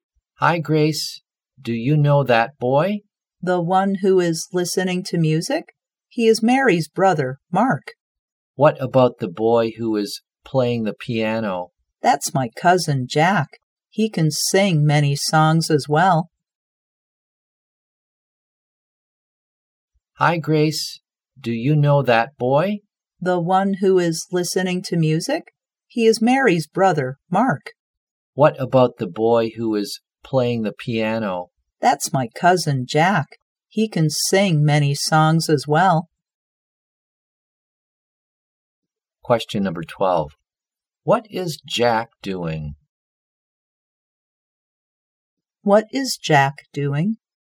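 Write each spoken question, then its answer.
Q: What is Jack doing?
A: Playing the piano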